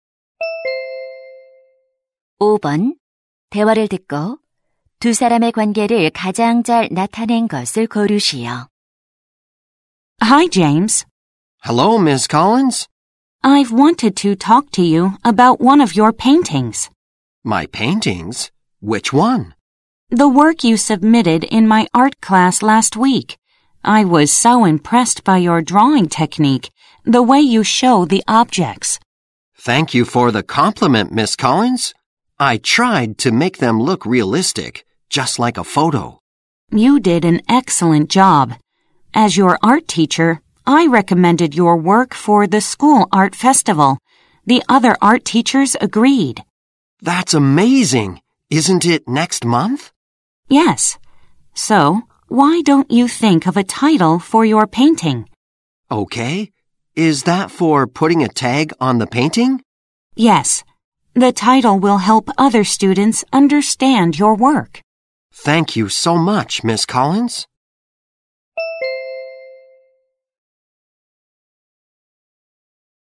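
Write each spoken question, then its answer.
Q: 대화를 듣고 두 사람의 관계를 가장 잘 나타낸 것을 고르시오.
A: 미술 교사 - 학생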